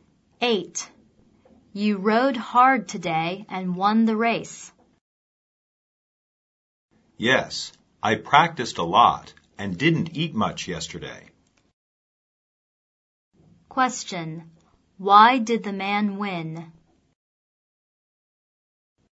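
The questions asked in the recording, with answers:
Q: Why did the man win?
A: He practiced a lot and didn't eat much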